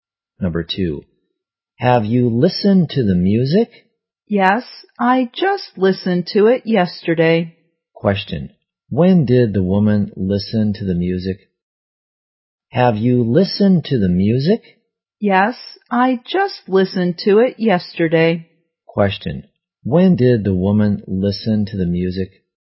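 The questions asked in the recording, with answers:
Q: when did the woman listen to the music?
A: Yesterday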